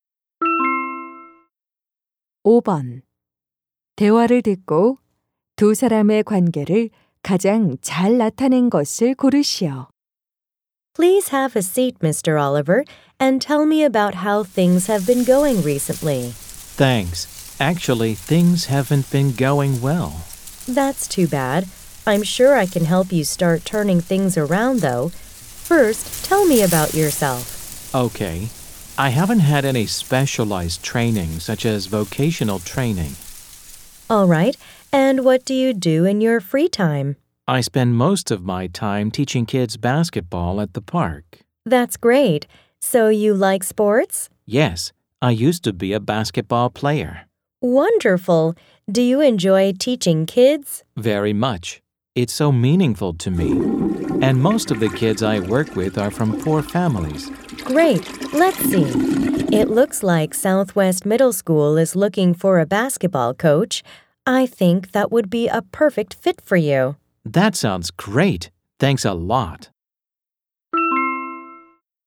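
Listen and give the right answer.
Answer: 직업 상담사 - 구직자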